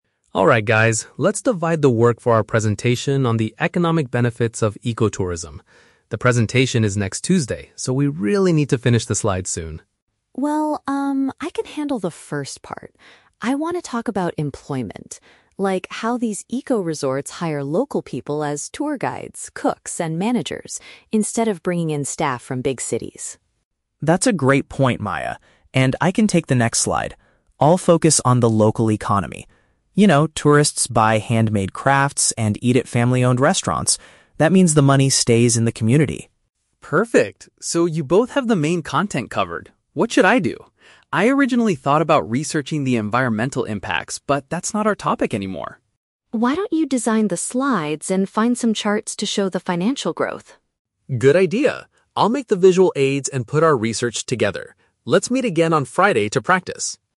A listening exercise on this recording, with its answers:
Listen to three college students discussing a group project. Choose the correct answer (A, B, or C) for each question.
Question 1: What will Maya discuss in her part of the presentation?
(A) How eco-resorts provide jobs for the people living there.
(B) Why big cities send their staff to work in eco-resorts.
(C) How to train local people to become professional cooks.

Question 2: What is the main idea of Leo's slide?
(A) How local communities use money to build new restaurants.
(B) Why handmade crafts are more expensive than normal souvenirs.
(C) How tourists' spending supports small neighborhood businesses.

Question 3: What was Ryan's original plan for the project?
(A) To create charts showing the financial growth.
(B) To study how tourism affects nature.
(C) To interview tourists about their spending habits.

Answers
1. (A) How eco-resorts provide jobs for the people living there.
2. (C) How tourists' spending supports small neighborhood businesses.
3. (B) To study how tourism affects nature.

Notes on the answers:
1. Maya says she wants to talk about "employment" and how eco-resorts "hire local people" (paraphrased as "provide jobs for the people living there").
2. Leo focuses on how tourists buy crafts and eat at "family-owned restaurants," meaning the "money stays in the community." This is paraphrased as "tourists' spending supports small neighborhood businesses."
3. Ryan says he originally thought about "researching the environmental impacts" (paraphrased as "study how tourism affects nature"), but it is no longer their topic.

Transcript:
Ryan: Alright guys, let's divide the work for our presentation on the economic benefits of ecotourism. The presentation is next Tuesday, so we really need to finish the slides soon.
Maya: Well, um, I can handle the first part. I want to talk about employment. Like, how these eco-resorts hire local people as tour guides, cooks, and managers, instead of bringing in staff from big cities.
Leo: That's a great point, Maya. And I can take the next slide. I'll focus on the local economy. You know, tourists buy handmade crafts and eat at family-owned restaurants. That means the money stays in the community.
Ryan: Perfect. So you both have the main content covered. What should I do? I originally thought about researching the environmental impacts, but that's not our topic anymore.
Maya: Why don't you design the slides and find some charts to show the financial growth?
Ryan: Good idea! I'll make the visual aids and put our research together. Let's meet again on Friday to practice.

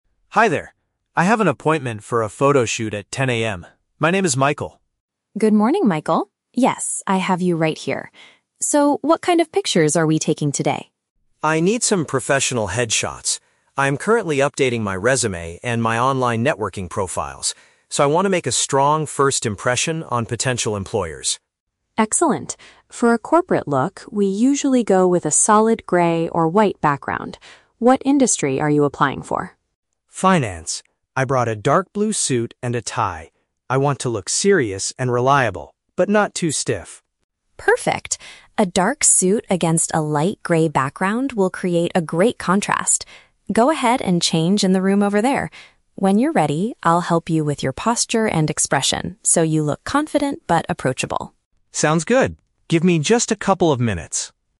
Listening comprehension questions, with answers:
Listen to the conversation between a customer and a photographer. Choose the correct answer (A, B, or C) for each question.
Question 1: Why does Michael want to have his picture taken?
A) He wants to update his family's personal photo album.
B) He needs a suitable image for his job applications and digital platforms.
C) He is required to submit a new photo to his current manager.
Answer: B) He needs a suitable image for his job applications and digital platforms.

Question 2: What kind of clothes will the man wear for the photo?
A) A casual outfit to look friendly and relaxed.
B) A formal set of clothing suitable for the financial sector.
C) A light gray shirt to match the studio background.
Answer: B) A formal set of clothing suitable for the financial sector.

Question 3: What does the photographer promise to do?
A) Guide the man on how to stand and look at the camera.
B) Digitally change the background color after the pictures are taken.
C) Provide him with the printed photos in just a few minutes.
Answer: A) Guide the man on how to stand and look at the camera.

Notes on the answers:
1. Michael says he is updating his "resume" (job applications) and "online networking profiles" (digital platforms) to impress potential employers. Option (B) accurately paraphrases this. Option (A) is not mentioned. Option (C) is The Trap: He mentions "employers", but these are potential employers in the future, not a current manager requiring a photo.
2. Michael mentions he is applying for the "Finance" industry and brought a "dark blue suit and a tie" (a formal set of clothing). Option (A) is The Trap: He mentions he wants to look "not too stiff" and Clara says "approachable" (similar to friendly/relaxed), but his actual outfit is a formal suit, not a casual outfit. Option (C) is The Trap: "Light gray" is the color of the background Clara suggests, not the color of his shirt.
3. Clara says, "I'll help you with your posture and expression". Option (A) perfectly paraphrases this (posture = how to stand; expression = how to look at the camera). Option (B) is The Trap: The background color is discussed, but Clara does not say she will edit it after the photos are taken; she is setting up a physical background. Option (C) is The Trap: Michael says "Give me just a couple of minutes" to change his clothes, not that Clara will print the photos in a few minutes.

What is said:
Michael: Hi there. I have an appointment for a photoshoot at 10 AM. My name is Michael.
Clara: Good morning, Michael! Yes, I have you right here. So, what kind of pictures are we taking today?
Michael: I need some professional headshots. I'm currently updating my resume and my online networking profiles, so I want to make a strong first impression on potential employers.
Clara: Excellent. For a corporate look, we usually go with a solid gray or white background. What industry are you applying for?
Michael: Finance. I brought a dark blue suit and a tie. I want to look serious and reliable, but not too stiff.
Clara: Perfect. A dark suit against a light gray background will create a great contrast. Go ahead and change in the room over there. When you're ready, I'll help you with your posture and expression so you look confident but approachable.
Michael: Sounds good. Give me just a couple of minutes.

